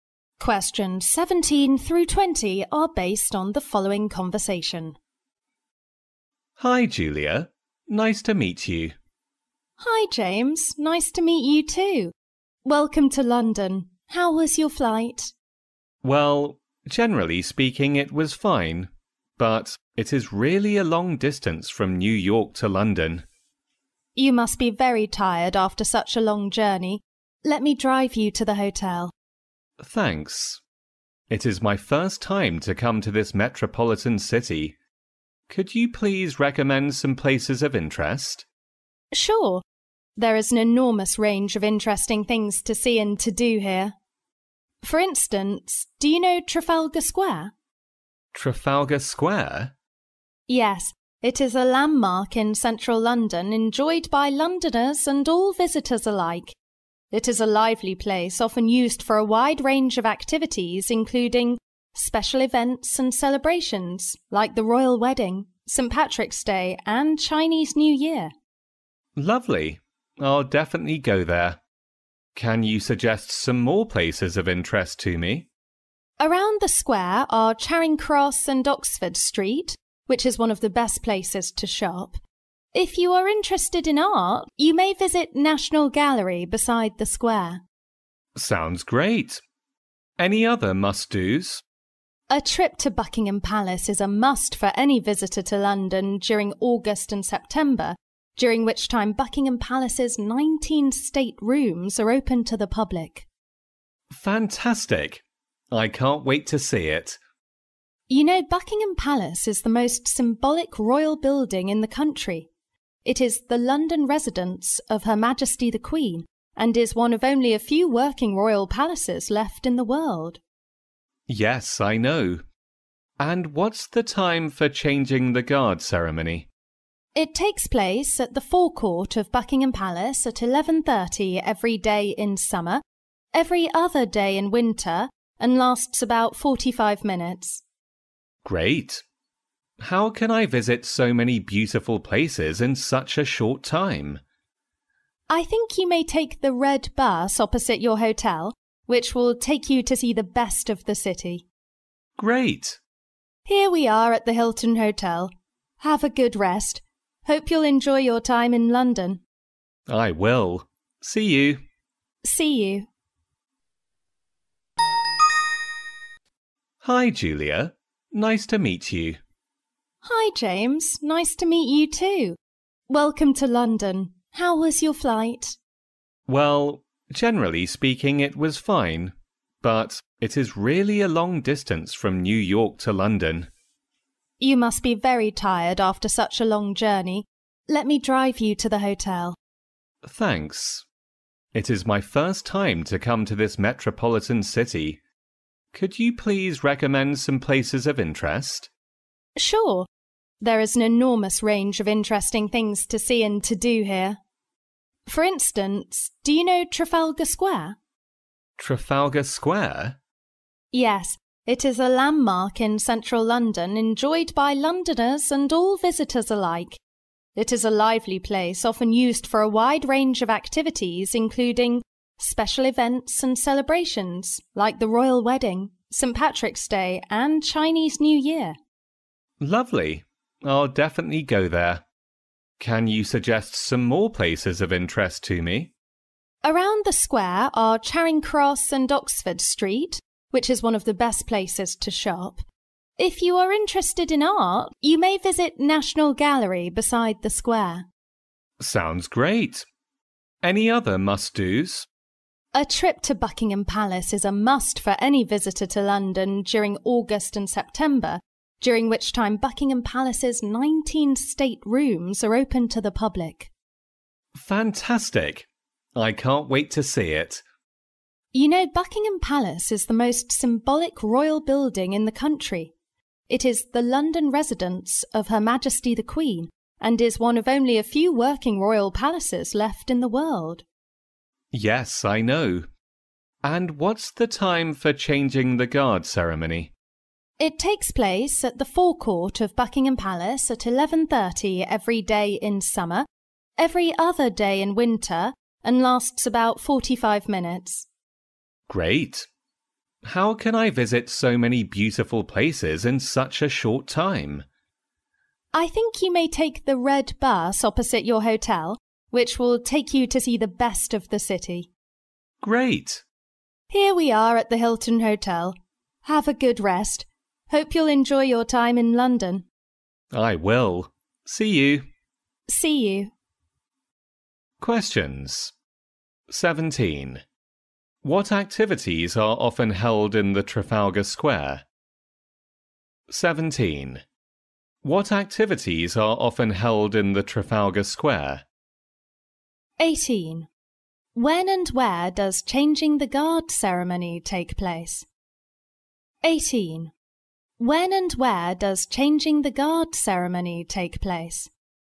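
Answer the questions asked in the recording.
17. Special events and celebrations, like the Royal Wedding, St. Patrick's Day and Chinese New Year
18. At 11:30 at the forecourt of Buckingham Palace, every day in summer and every other day in winter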